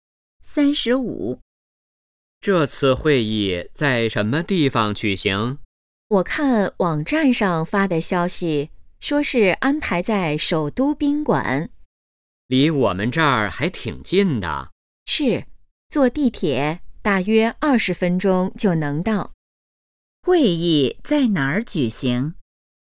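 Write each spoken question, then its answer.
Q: 会议在哪儿举行?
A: 首都宾馆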